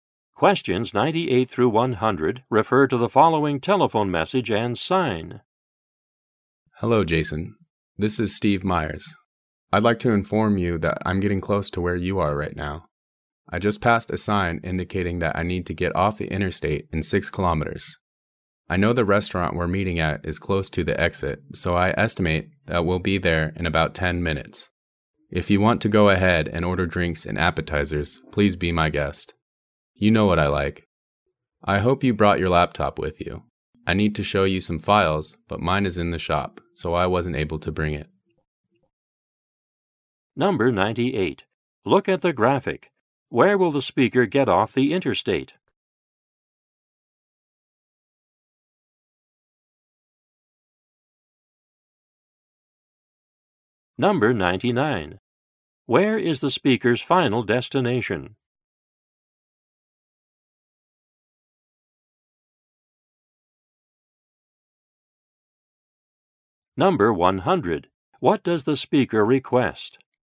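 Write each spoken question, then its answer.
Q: Where is the speaker's final destination?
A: A restaurant

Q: What does the speaker request?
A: That Jason bring his laptop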